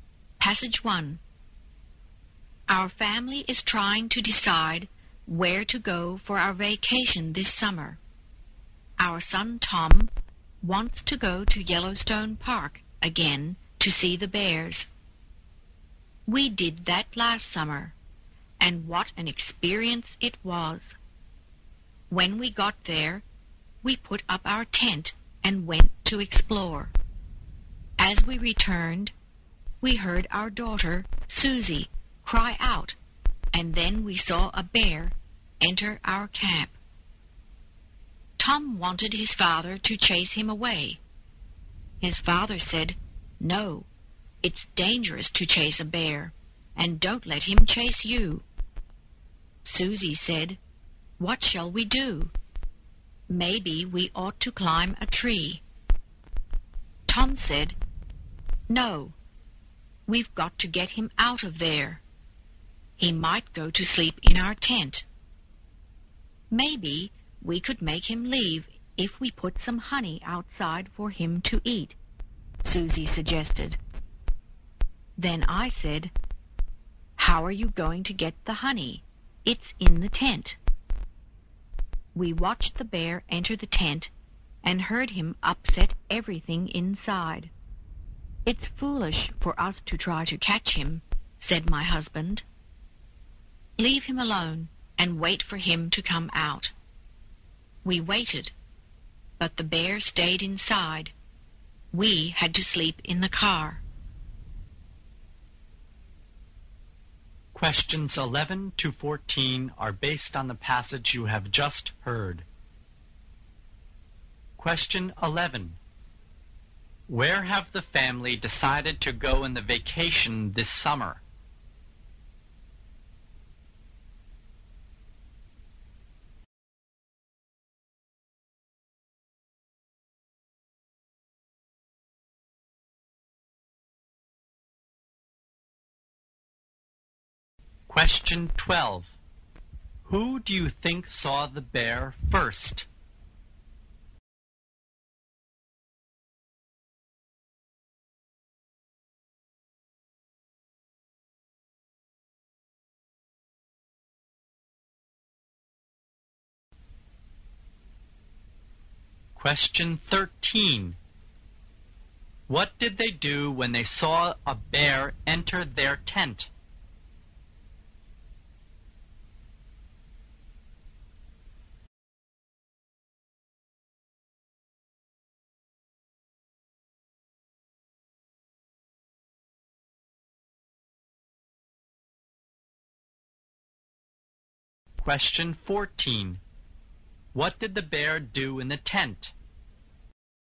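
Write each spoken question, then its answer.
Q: Who do you think saw the bear first?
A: Susie

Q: What did they do when they saw a bear enter their tent?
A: They waited for it to come out

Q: What did the bear do in the tent?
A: It upset everything inside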